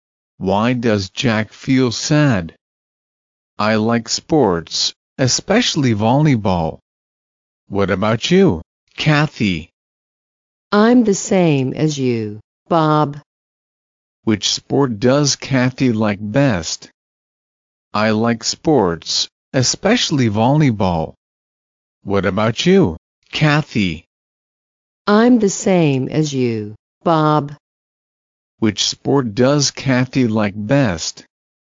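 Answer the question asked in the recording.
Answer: Volleyball.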